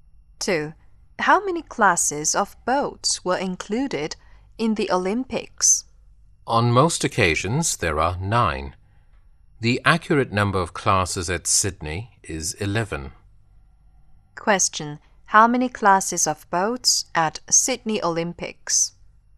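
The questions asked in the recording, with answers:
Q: How many classes of boats at Sydney Olympics?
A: 11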